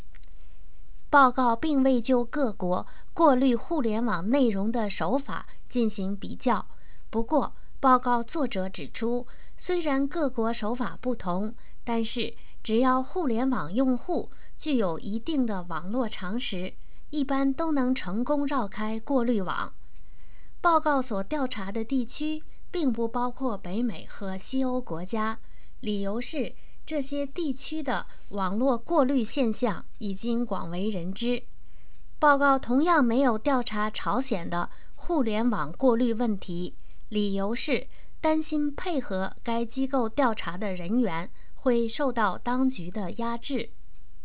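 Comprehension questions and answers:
Please answer the following questions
Why did the survey not include countries in North America and Western Europe?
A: Because internet filtering in those regions is already widely known

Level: M.Phil Year 2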